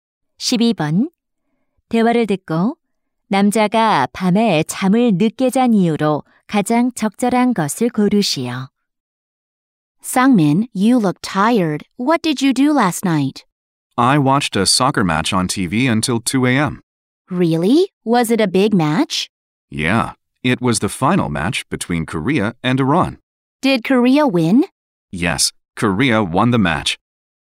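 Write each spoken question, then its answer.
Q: 대화를 듣고 남자가 밤에 잠을 늦게 잔 이유로 가장 적절한 것을 고르시오.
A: TV로 축구 경기를 봐서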